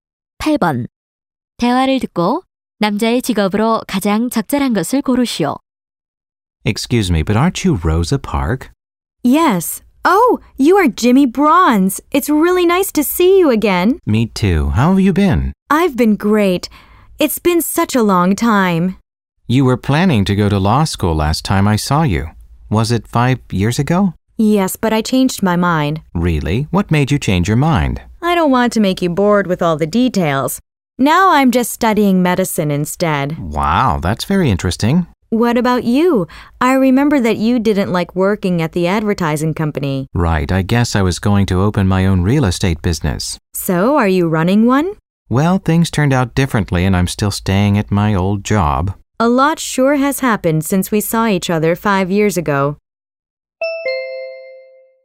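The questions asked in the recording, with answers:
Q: 대화를 듣고 남자의 직업으로 가장 적절한 것을 고르시오.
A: 의대생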